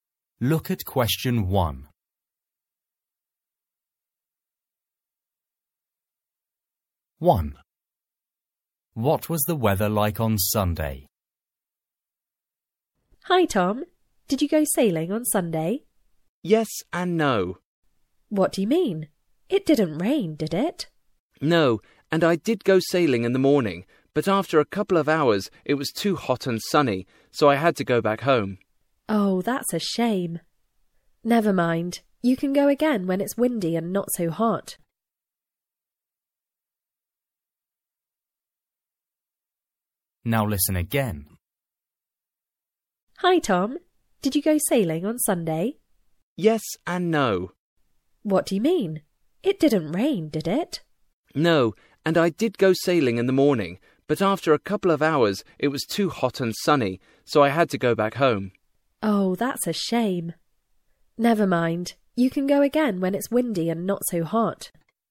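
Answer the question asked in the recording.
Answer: Hot and sunny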